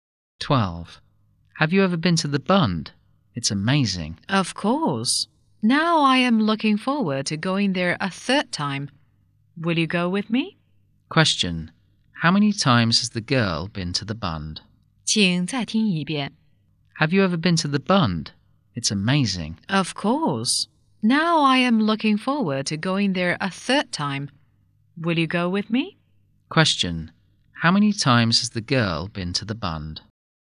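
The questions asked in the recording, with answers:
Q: Question. How many times has the girl been to the Bund?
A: Twice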